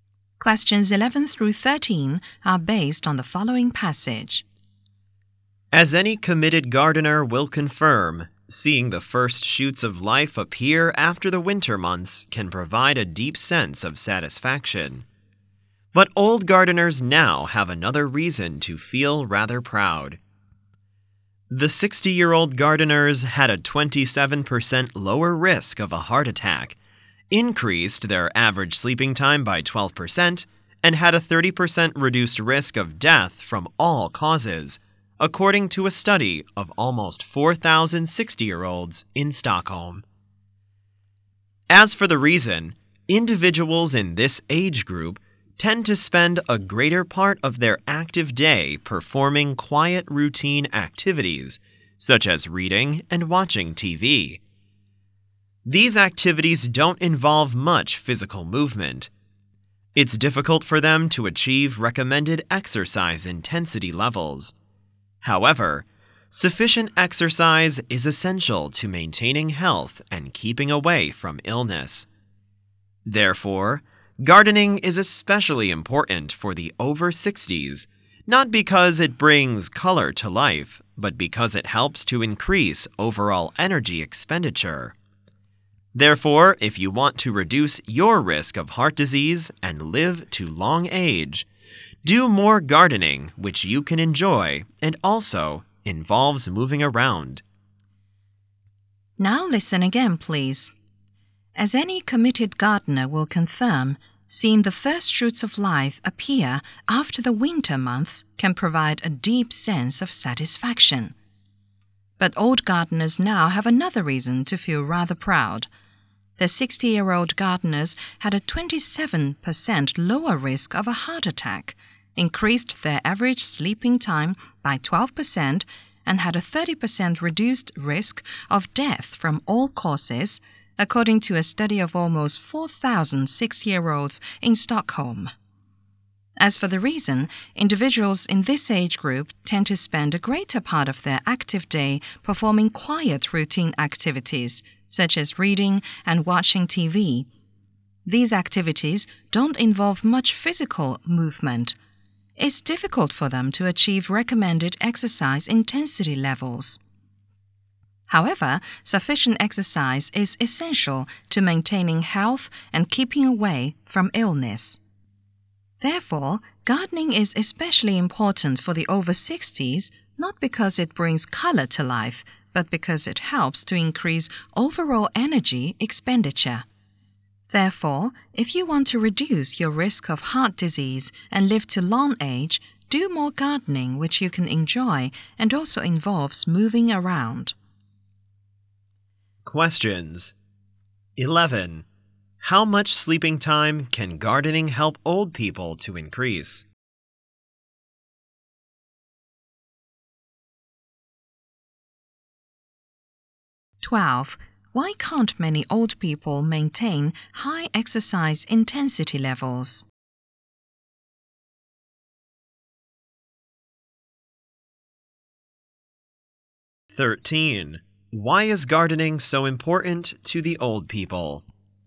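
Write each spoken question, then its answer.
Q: How much sleeping time can gardening help old people to increase?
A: 12%

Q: Why can't many old people maintain high exercise intensity levels?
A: They spend most of their active day on quiet routine activities like reading and watching TV.

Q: Why is gardening so important to the old people?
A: It helps increase overall energy expenditure.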